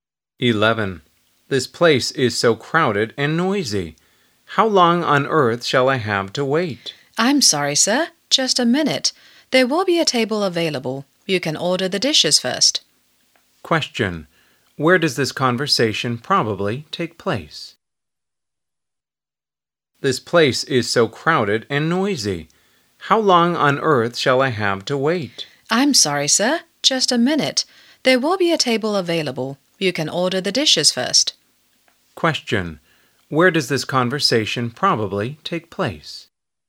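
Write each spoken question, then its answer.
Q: Where does this conversation probably take place?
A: In a restaurant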